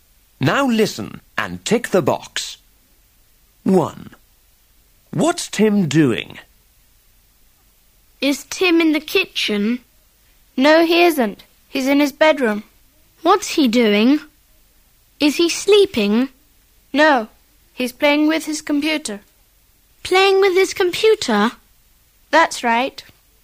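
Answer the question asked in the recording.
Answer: Playing with his computer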